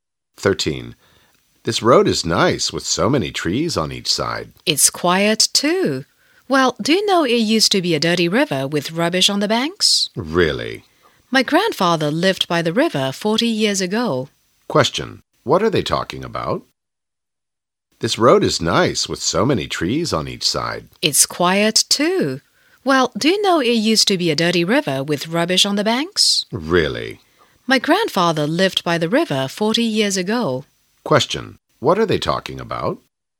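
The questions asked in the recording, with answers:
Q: Question. What are they talking about?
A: The changes of a road that used to be a dirty river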